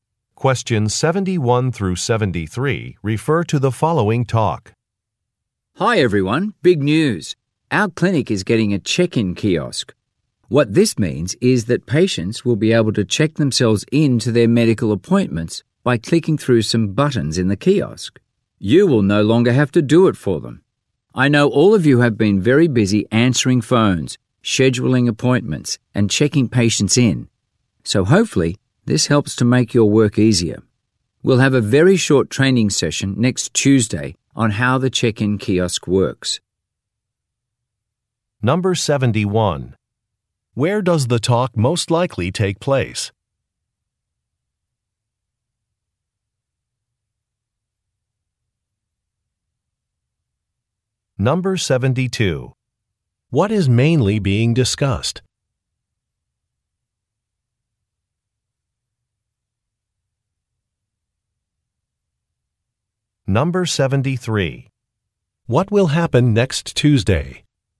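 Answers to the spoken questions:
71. At a medical clinic
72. A new check-in kiosk for patients
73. A short training session on the kiosk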